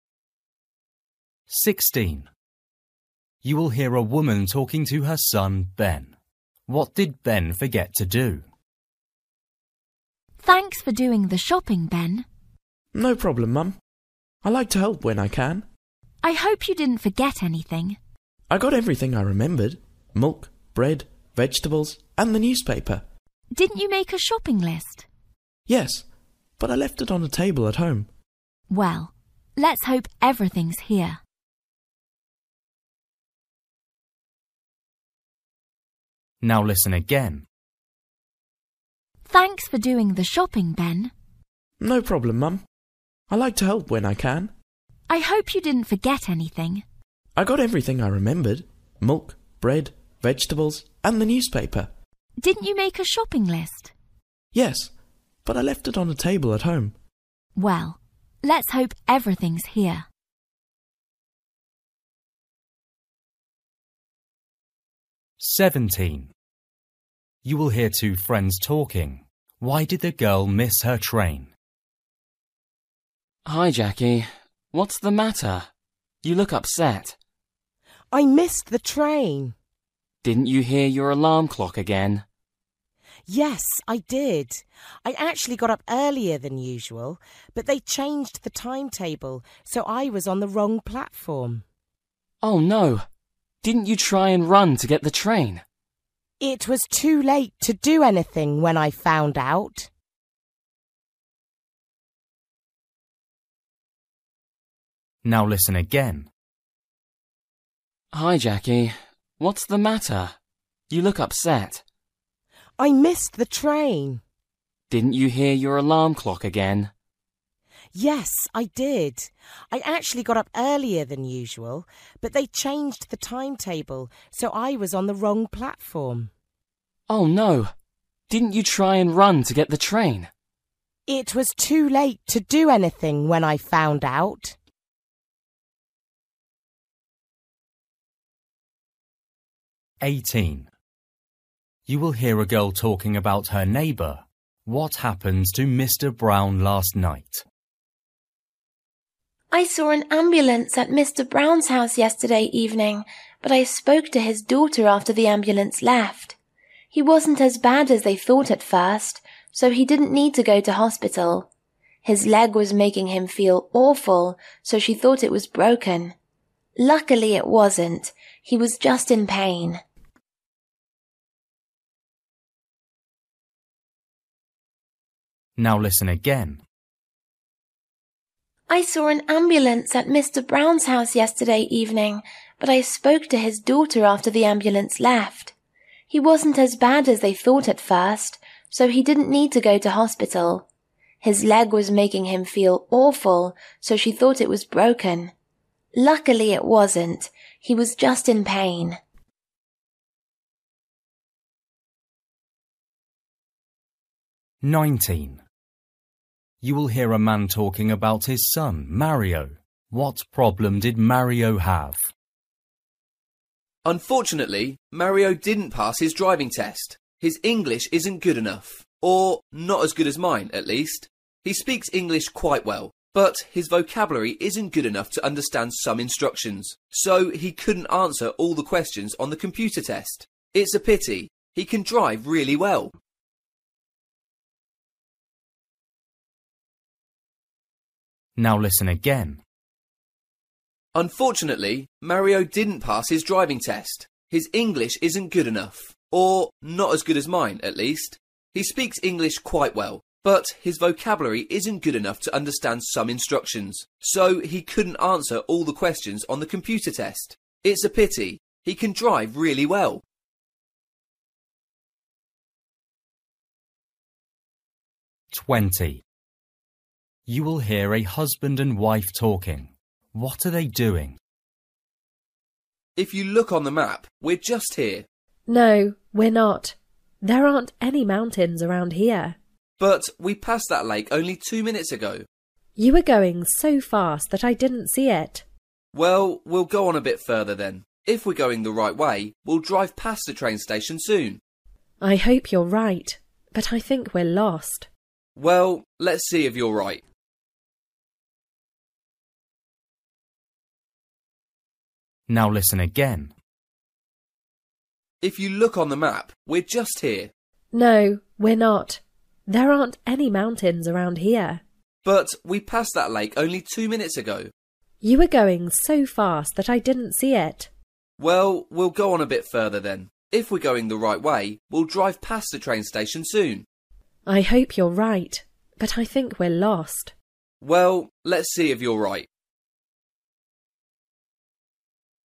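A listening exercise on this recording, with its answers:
For each question, choose the correct answer.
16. You will hear a woman talking to her son, Ben. What did Ben forget to do?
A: take the shopping list

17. You will hear two friends talking. Why did the girl miss her train?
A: she was on the wrong platform because the timetable changed

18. You will hear a girl talking about her neighbour. What happened to Mr Brown last night?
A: he hurt his leg

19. You will hear a man talking about his son, Mario. What problem did Mario have?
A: he failed the computer part of his driving test because of his English vocabulary

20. You will hear a husband and wife talking. What are they doing?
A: looking at a map because they are lost while driving

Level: Luyện nghe trình độ A2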